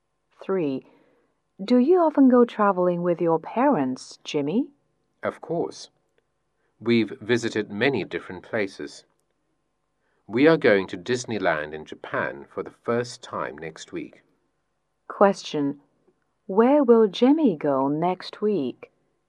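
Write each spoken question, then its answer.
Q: Where will Jimmy go next week?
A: Disneyland in Japan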